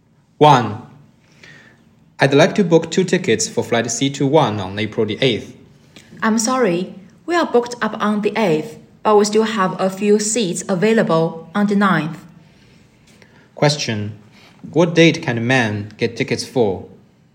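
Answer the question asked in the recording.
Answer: April the 9th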